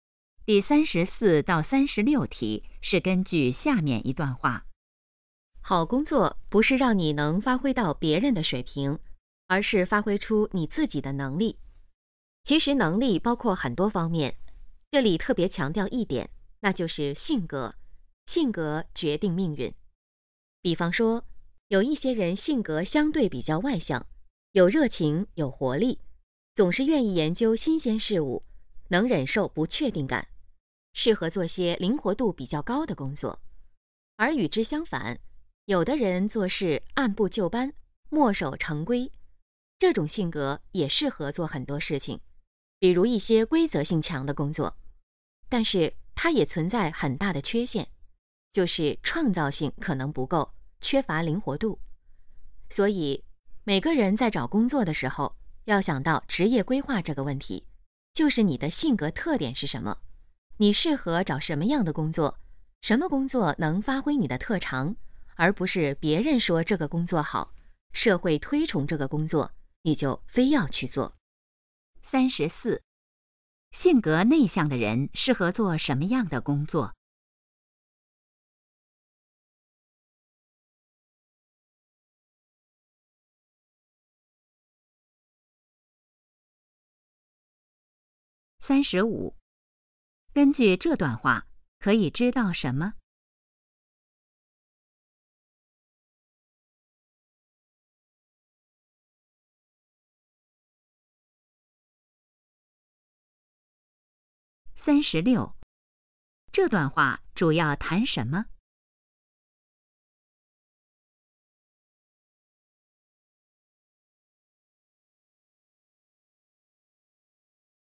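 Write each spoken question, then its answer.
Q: 性格内向的人适合做什么样的工作?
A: 规则性强的工作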